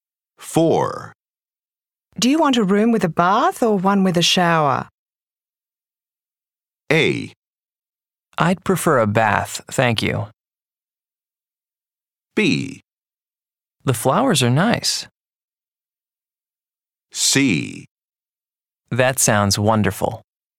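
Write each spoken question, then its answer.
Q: Do you want a room with a bath or one with a shower?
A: A: I'd prefer a bath, thank you.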